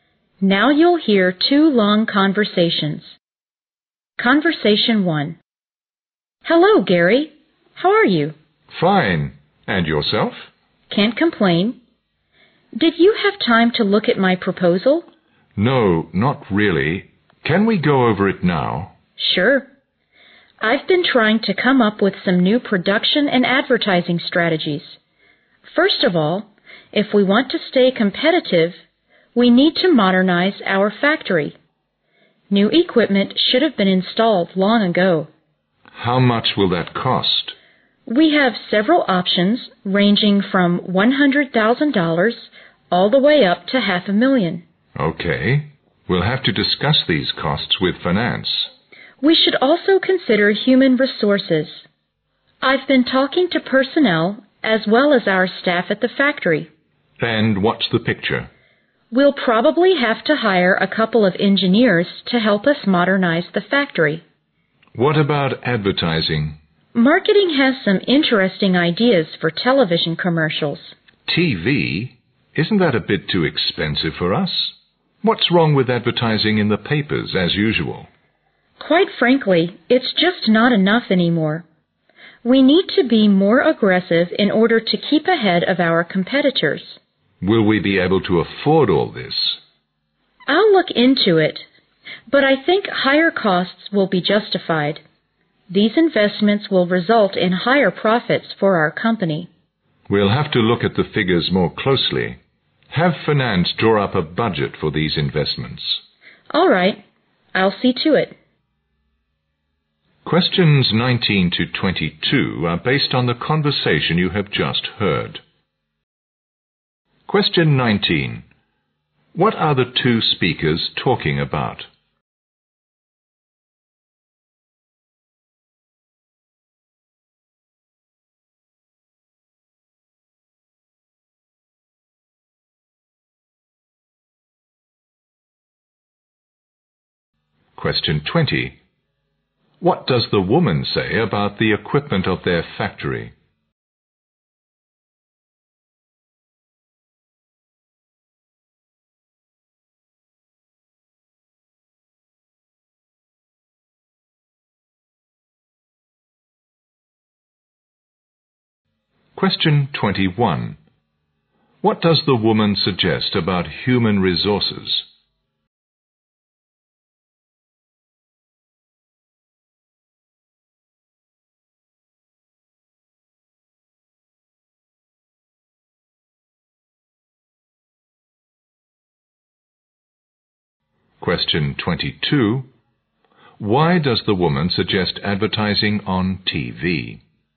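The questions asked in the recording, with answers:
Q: What are the two speakers talking about?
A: The woman's proposal for new production and advertising strategies.

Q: What does the woman say about the equipment of their factory?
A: It should have been replaced with new equipment long ago.

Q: What does the woman suggest about human resources?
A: They will need to hire a couple of engineers.

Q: Why does the woman suggest advertising on TV?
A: To stay ahead of their competitors.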